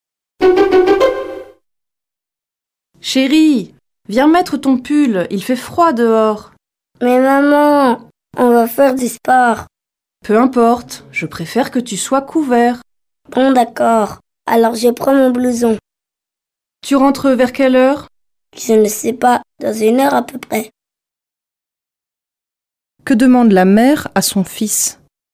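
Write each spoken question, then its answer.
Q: Que demande la mère à son fils ?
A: De mettre son pull (de se couvrir)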